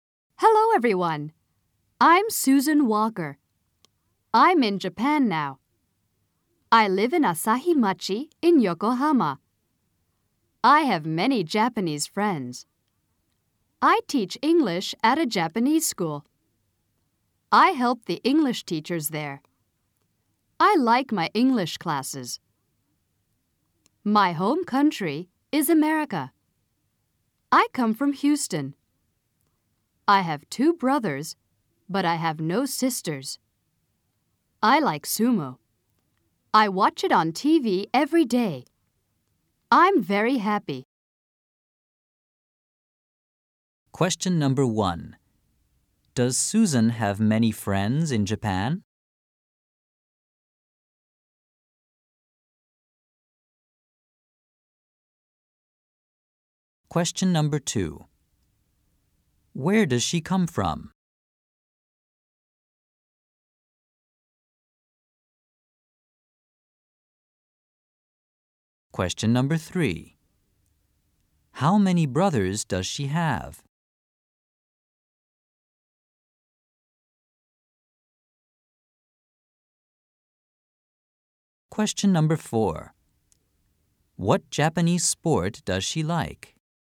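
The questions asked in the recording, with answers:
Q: Does Susan have many friends in Japan?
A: Yes, she does.

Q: Where does she come from?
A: Houston, America

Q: How many brothers does she have?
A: Two

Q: What Japanese sport does she like?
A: Sumo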